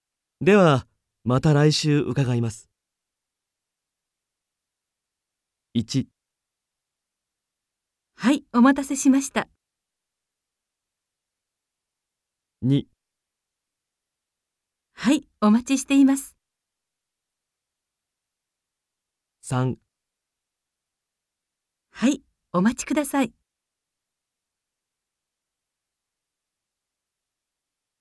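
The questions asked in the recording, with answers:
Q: ではまた来週伺います。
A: 2: はい、お待ちしています。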